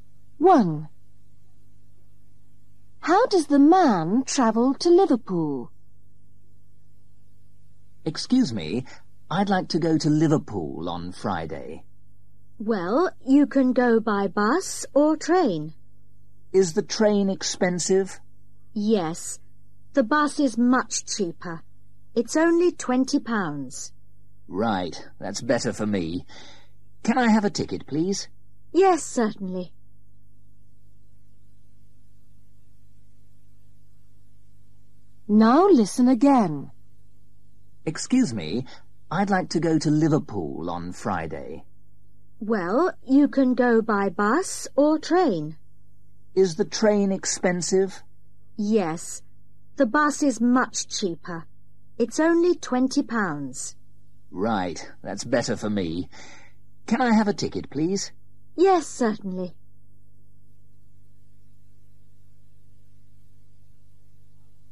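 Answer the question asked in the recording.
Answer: by bus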